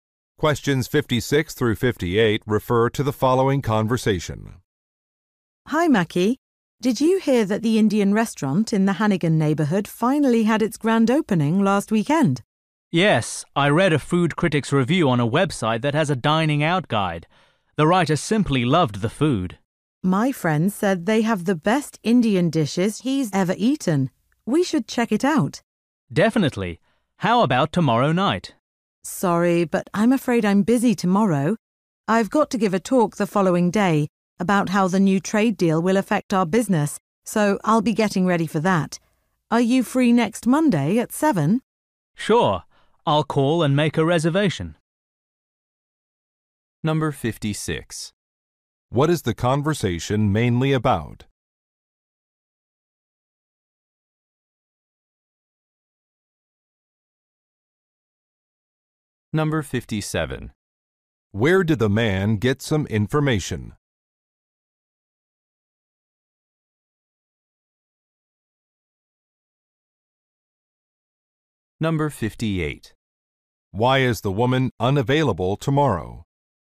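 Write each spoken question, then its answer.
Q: What is the conversation mainly about?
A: A new Indian restaurant

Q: Why is the woman unavailable tomorrow?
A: She must prepare for a talk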